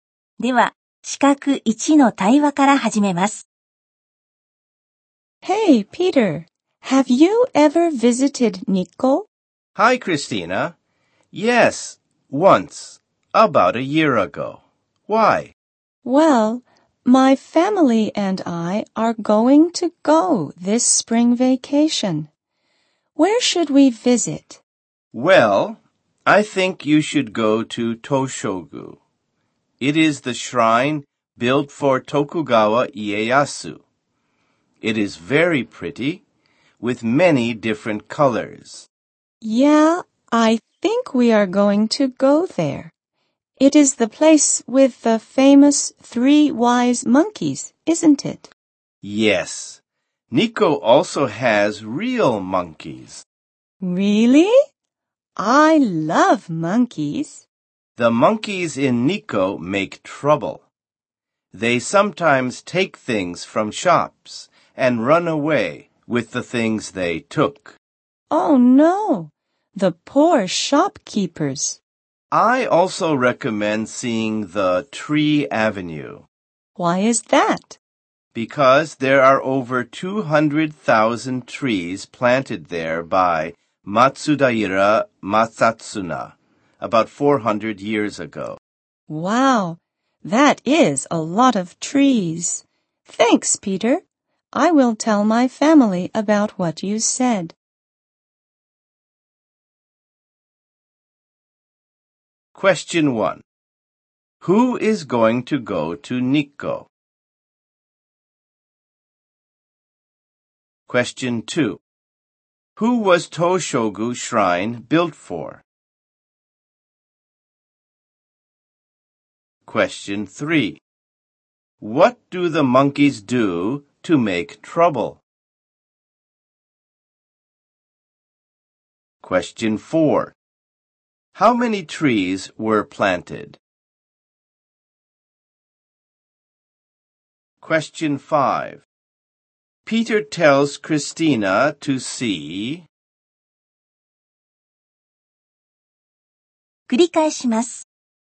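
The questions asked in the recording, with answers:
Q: Who is going to go to Nikko?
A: Christina and her family

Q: Who was Toshogu Shrine built for?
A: Tokugawa Ieyasu

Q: What do the monkeys do to make trouble?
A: They take things from shops and run away with them

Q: How many trees were planted?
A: Over 200,000

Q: Peter tells Christina to see...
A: Toshogu and the Tree Avenue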